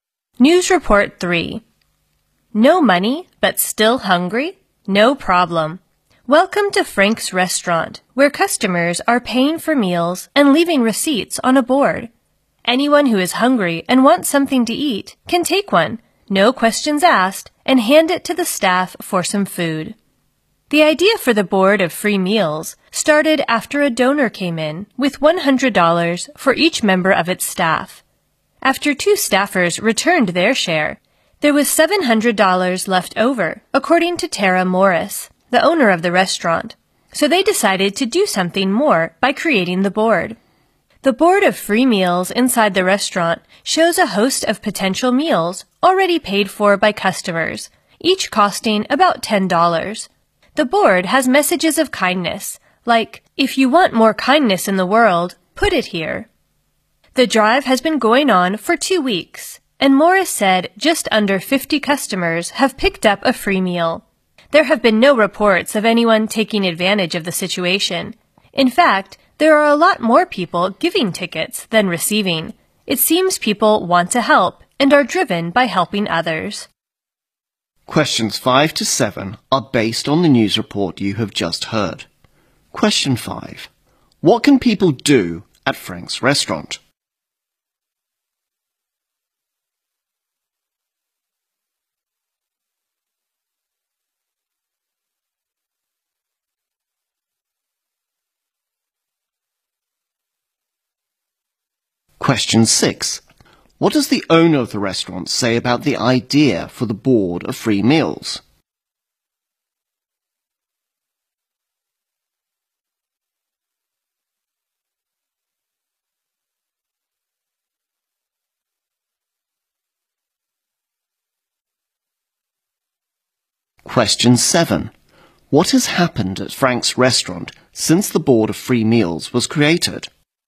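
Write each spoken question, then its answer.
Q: What can people do at Frank's restaurant?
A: Take a prepaid receipt from the board and get a free meal.

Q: What does the owner of the restaurant say about the idea for the board of free meals?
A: It started after a donor gave $100 to each staff member, leaving $700.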